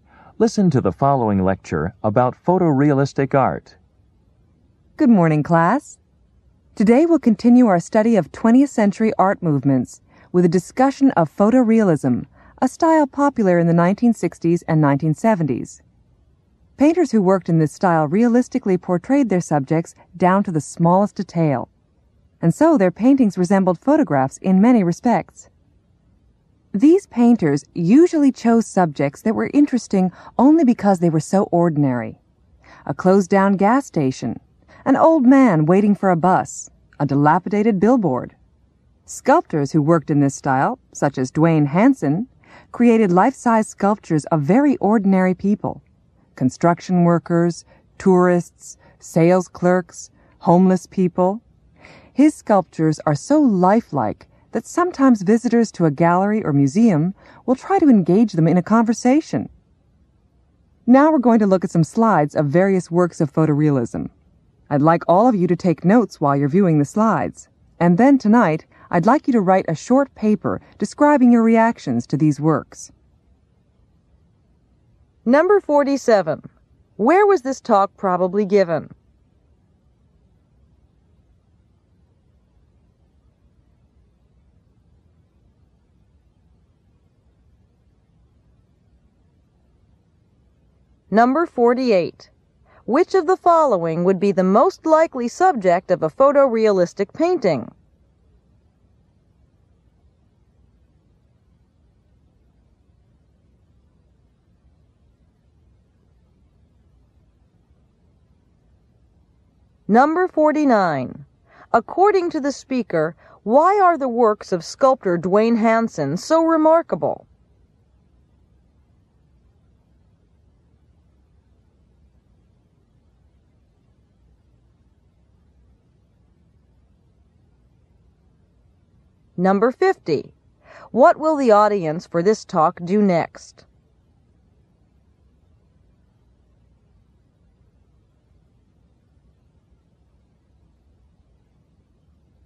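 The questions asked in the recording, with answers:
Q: Where was this talk probably given?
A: In an art class

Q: According to the speaker, why are the works of sculptor Dwayne Hansen so remarkable?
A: They are so lifelike that visitors sometimes try to talk to them

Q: What will the audience for this talk do next?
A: Look at slides of photorealistic works and take notes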